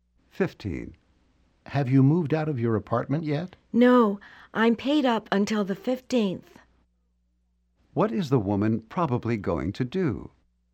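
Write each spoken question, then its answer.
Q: What is the woman probably going to do?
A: Stay in the apartment until the 15th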